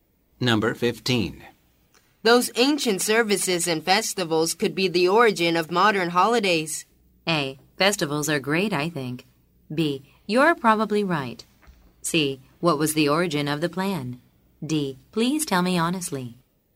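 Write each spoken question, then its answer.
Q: Those ancient services and festivals could be the origin of modern holidays.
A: B: You're probably right.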